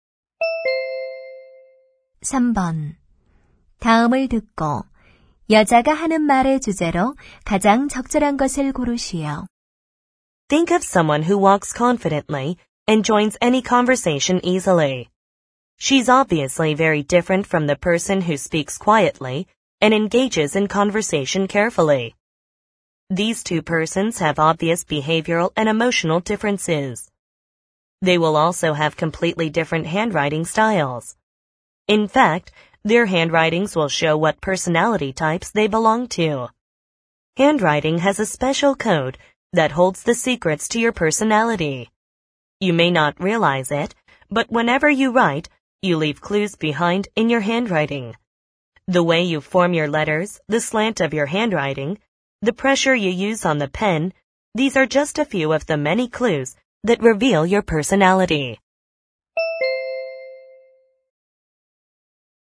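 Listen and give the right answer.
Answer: 필체가 성격을 드러낸다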